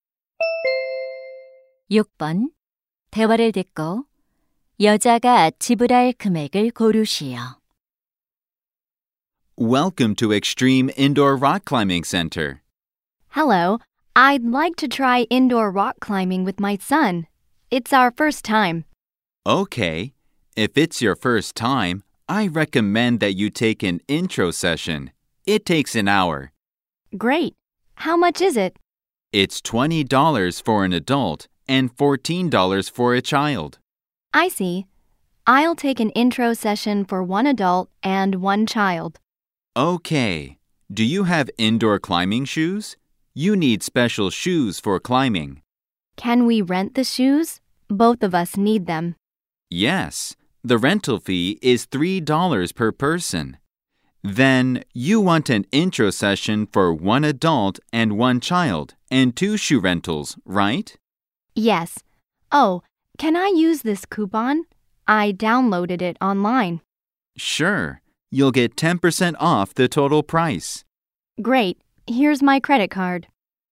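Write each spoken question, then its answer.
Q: 대화를 듣고 여자가 지불할 금액을 고르시오.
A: $36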